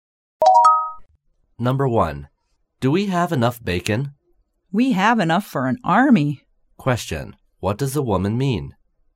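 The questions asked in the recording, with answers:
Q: What does the woman mean?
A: They have more than enough bacon.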